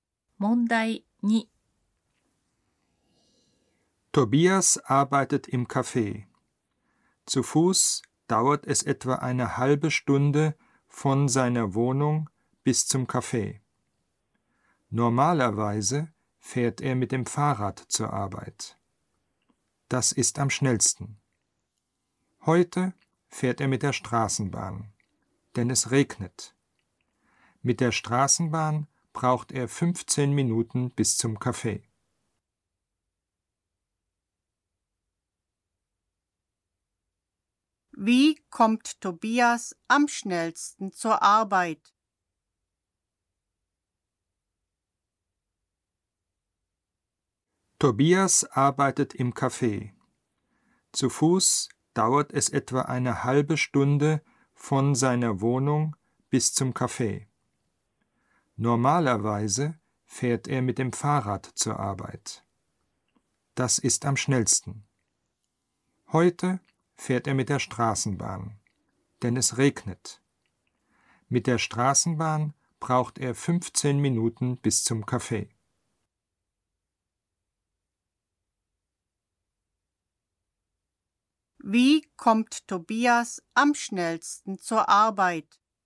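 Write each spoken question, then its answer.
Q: Wie kommt Tobias am schnellsten zur Arbeit?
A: Mit dem Fahrrad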